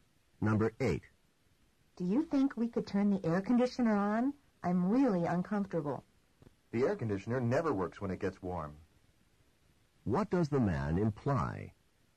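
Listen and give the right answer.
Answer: Turning on the air conditioner won't help; it doesn't work in warm weather.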